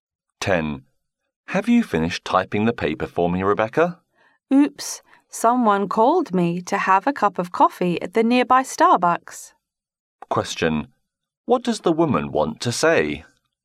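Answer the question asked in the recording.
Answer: She hasn't finished typing the paper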